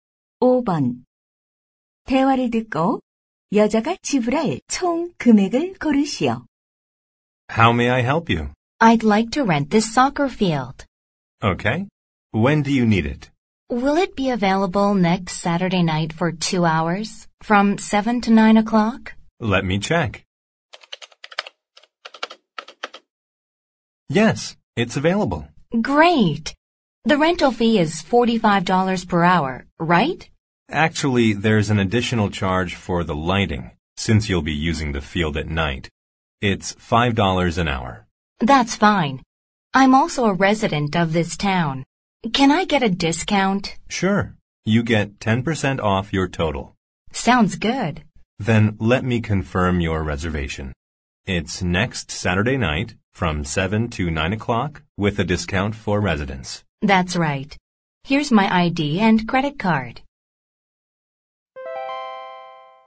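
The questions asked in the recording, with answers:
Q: 대화를 듣고 여자가 지불할 총 금액을 고르시오.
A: $90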